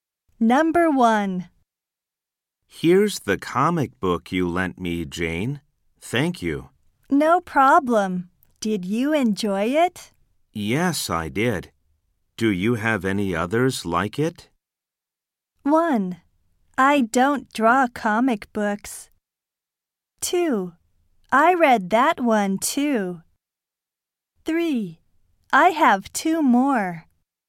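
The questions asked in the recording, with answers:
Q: Yes, I did. Do you have any others like it?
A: 3: I have 2 more.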